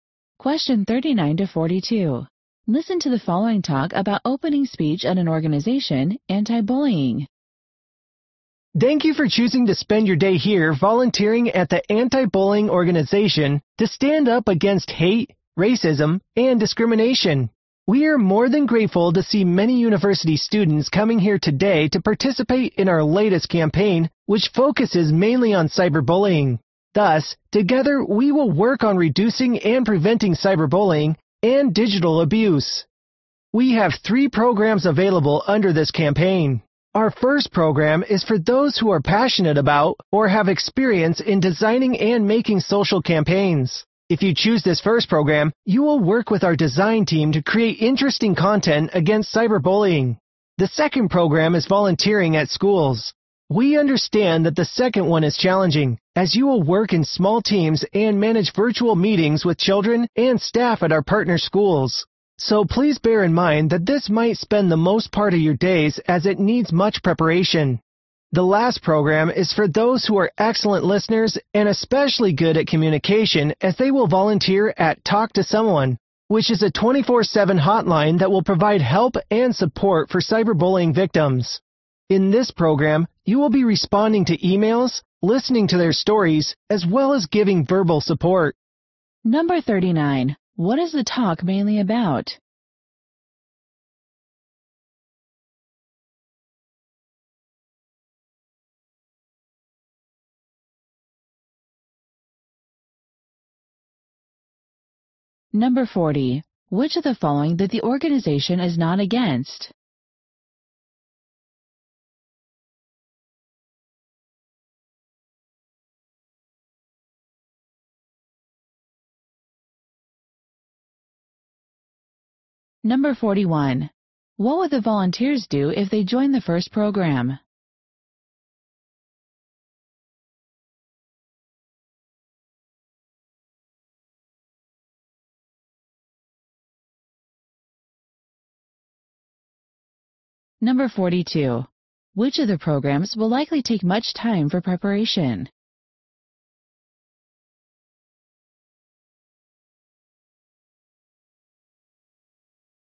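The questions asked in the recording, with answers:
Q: What is the talk mainly about?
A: Volunteer programs in an anti-cyberbullying campaign

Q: What would the volunteers do if they joined the first program?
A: Work with the design team to create content against cyberbullying

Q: Which of the programs will likely take much time for preparation?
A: Volunteering at schools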